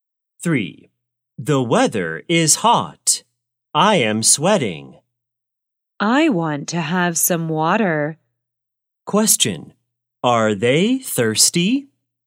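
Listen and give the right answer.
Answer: Yes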